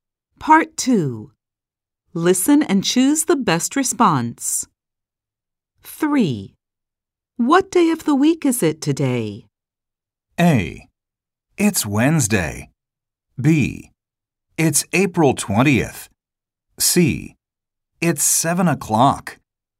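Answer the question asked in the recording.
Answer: A: It's Wednesday.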